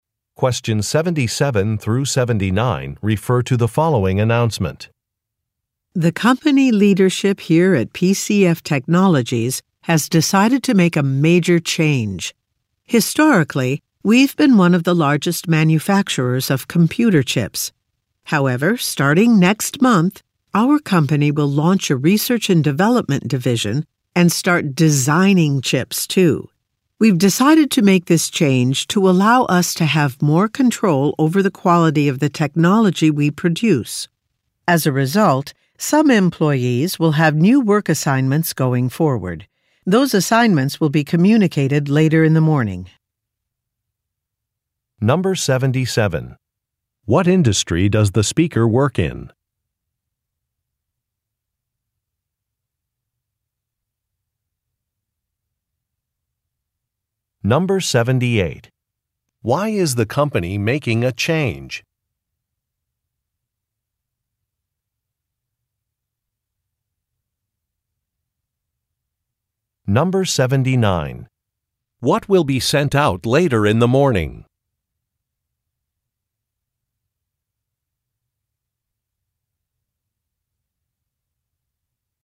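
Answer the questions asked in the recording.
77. Technology (computer chip manufacturing)
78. To have more control over the quality of the technology it produces
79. New work assignments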